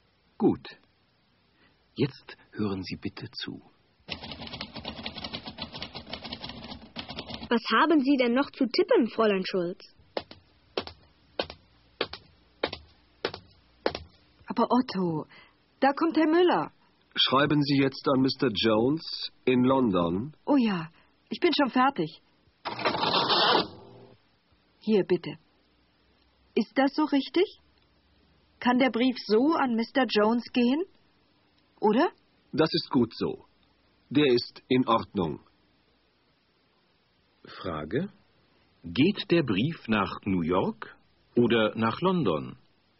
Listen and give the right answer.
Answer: Er geht nach London.